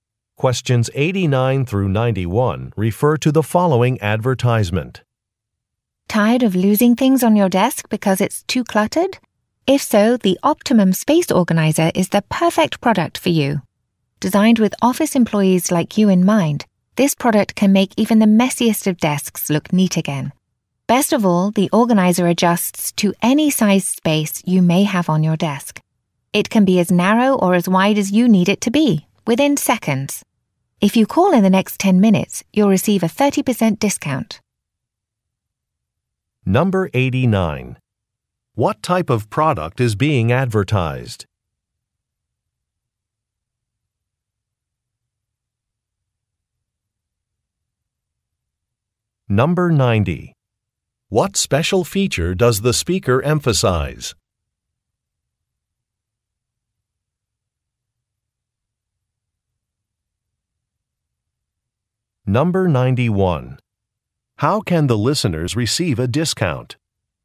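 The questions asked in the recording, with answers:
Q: What type of product is being advertised?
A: A desk organizer

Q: What special feature does the speaker emphasize?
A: It adjusts to any size space

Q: How can the listeners receive a discount?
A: By calling within 10 minutes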